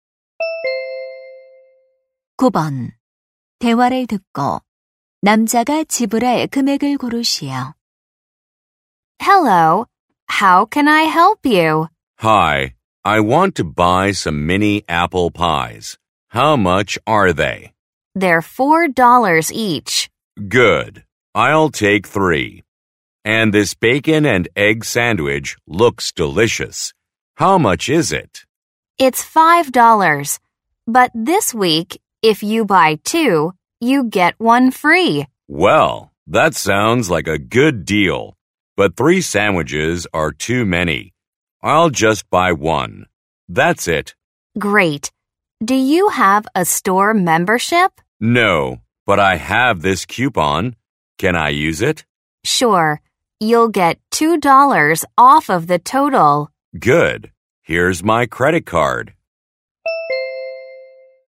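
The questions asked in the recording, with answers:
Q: 대화를 듣고 남자가 지불할 금액을 고르시오.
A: $15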